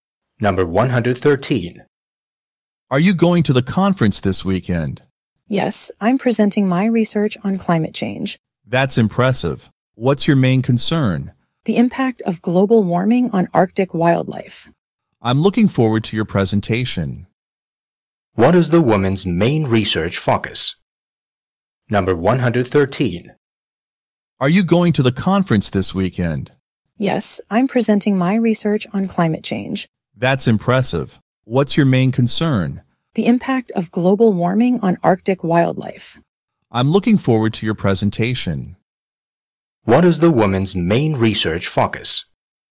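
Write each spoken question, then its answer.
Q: What is the woman's main research focus?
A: The impact of global warming on Arctic wildlife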